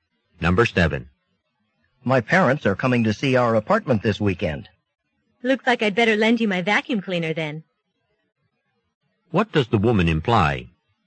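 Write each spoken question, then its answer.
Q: What does the woman imply?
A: The man should clean the apartment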